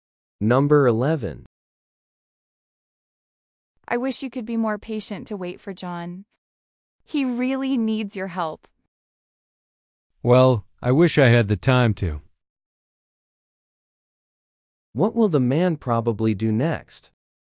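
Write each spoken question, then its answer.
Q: What will the man probably do next?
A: He won't wait for John because he has no time.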